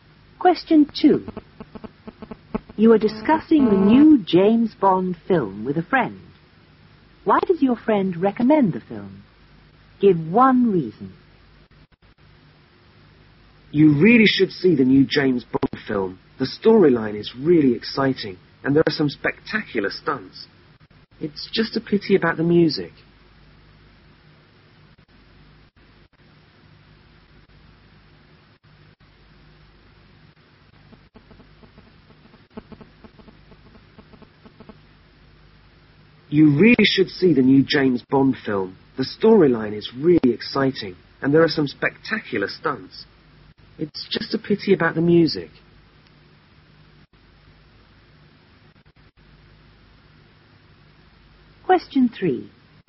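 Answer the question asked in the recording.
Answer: The storyline is exciting / there are spectacular stunts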